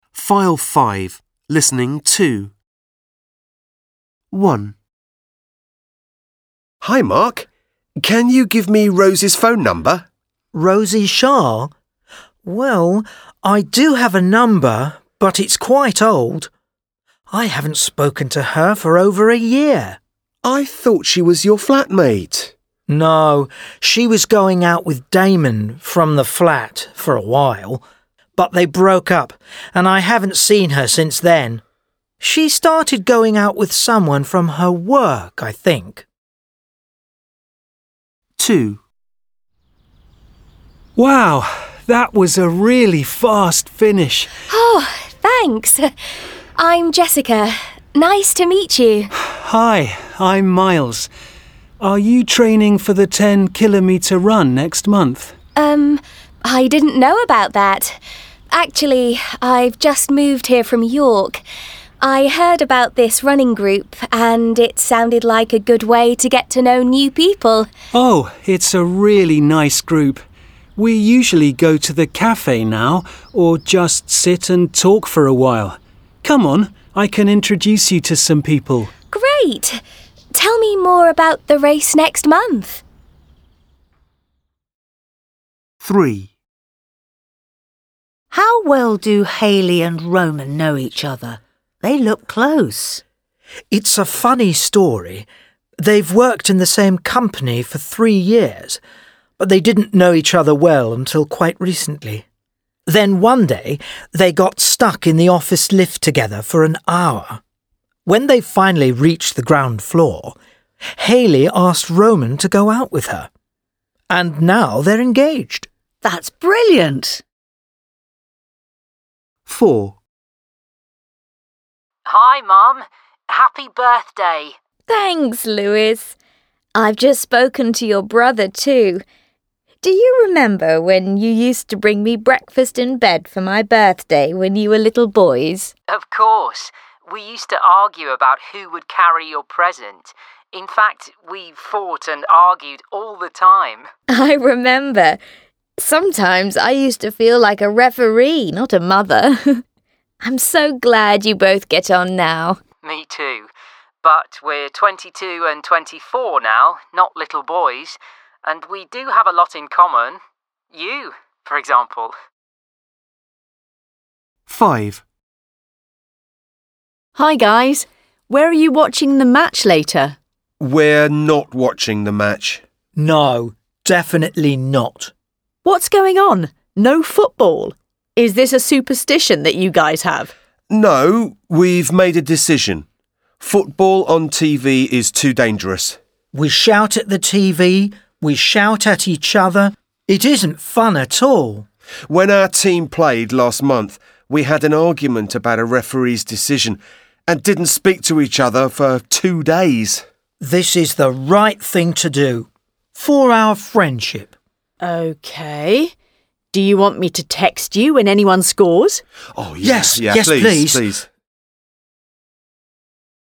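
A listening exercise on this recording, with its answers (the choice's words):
Listen to five conversations. Tick (√)A, B or C.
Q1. Why didn't Mark keep in touch with Rosie?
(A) Rosie lost her job.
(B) Mark got a new flatmate.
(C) Rosie broke up with her boyfriend.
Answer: Rosie broke up with her boyfriend.

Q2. Why did Jessica join the running group?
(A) Because she has a problem with her health.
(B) Because she has just moved to a new town.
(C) Because she is training for a long race.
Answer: Because she has just moved to a new town.

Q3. Are Hayley and Roman colleagues?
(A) Yes, but they don't know each other well.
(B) No, they're going out together.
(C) Yes, and they're getting married.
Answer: Yes, and they're getting married.

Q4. What does Lewis think about his brother?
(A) They're aren't as close as they used to be.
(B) Their relationship has stayed the same.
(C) They're closer than they used to be.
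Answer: They're closer than they used to be.

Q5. Why aren't Tomas and Albert watching the football match on TV?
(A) It makes them argue.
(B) They think it's unlucky for their team.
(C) Their team lost last month.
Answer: It makes them argue.

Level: English File B1 – Unit 5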